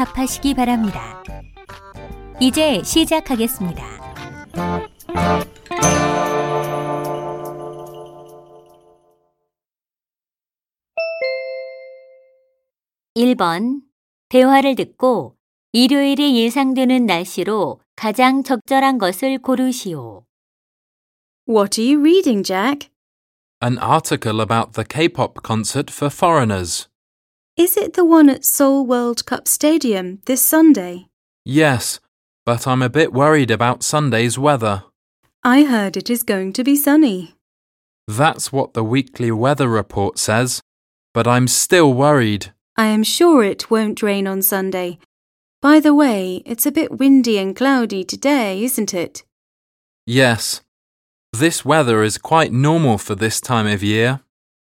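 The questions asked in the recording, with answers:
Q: 대화를 듣고 일요일이 예상되는 날씨로 가장 적절한 것을 고르시오.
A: 맑음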